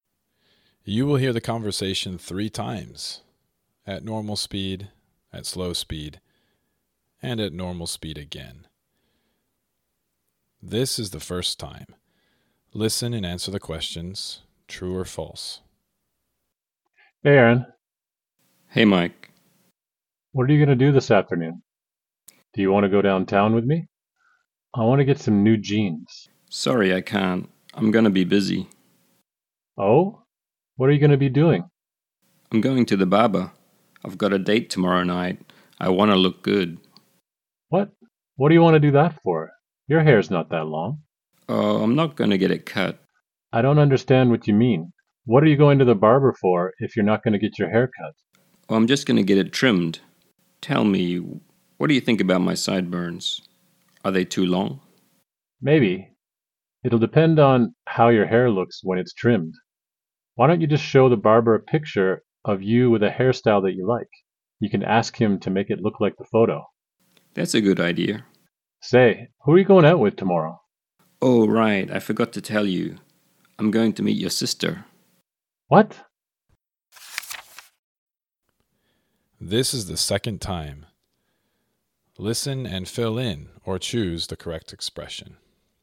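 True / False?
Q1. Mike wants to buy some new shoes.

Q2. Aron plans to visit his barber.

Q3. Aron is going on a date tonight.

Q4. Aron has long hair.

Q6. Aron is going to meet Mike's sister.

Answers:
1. False
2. True
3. False
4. False
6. True

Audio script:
• Hey Mike.
You will hear the conversation three times - at normal speed, at slow speed, and at normal speed again.
This is the first time. Listen and answer the questions - true or false.
ARON: Hey Mike.
MIKE: What are you going to do this afternoon? Do you want to go downtown with me? I want to get some new jeans.
ARON: Sorry, I can't. I'm going to be busy.
ARON: I'm going to the barber. I've got a date tomorrow night. I want to look good.
MIKE: What? What do you want to do that for? Your hair's not that long.
ARON: Oh, I'm not going to get it cut.
MIKE: I don't understand what you mean. What are you going to the barber for if you're not going to get your hair cut?
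ARON: Oh, I'm just going to get it trimmed. Tell me, what do you think about my sideburns? Are they too long?
MIKE: Maybe. It'll depend on how your hair looks when it's trimmed. Why don't you just show the barber a picture of you with a hair style that you like? You can ask him to make it look like the photo.
ARON: That's a good idea.
MIKE: Say, who are you going out with tomorrow?
ARON: Oh right. I forgot to tell you. I'm going to meet your sister.
MIKE: What?
This is the second time. Listen and fill in or choose the correct expression.

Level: Level 3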